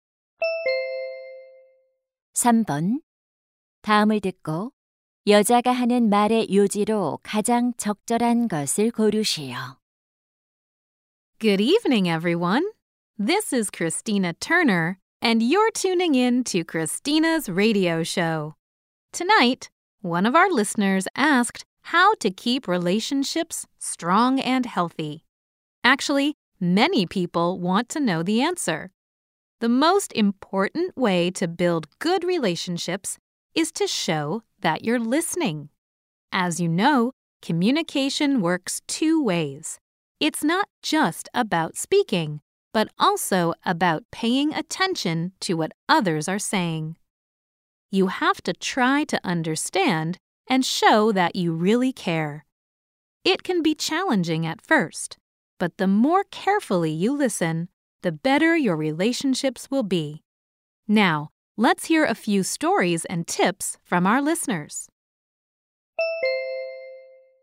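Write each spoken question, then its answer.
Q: 다음을 듣고 여자가 하는 말의 요지로 가장 적절한 것을 고르시오.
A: 좋은 관계를 위해서는 경청하는 태도를 보여야 한다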